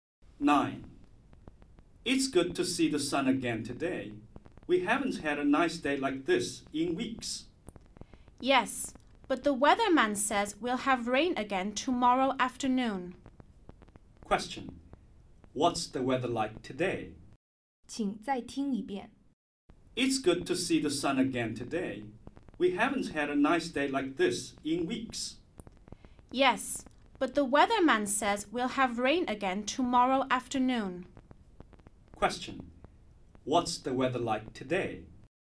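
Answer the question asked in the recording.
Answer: Sunny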